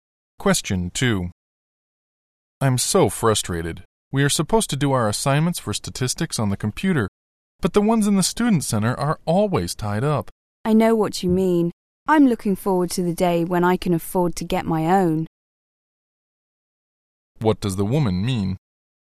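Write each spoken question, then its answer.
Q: What does the woman mean?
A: She would also like to have her own computer but can't afford one yet.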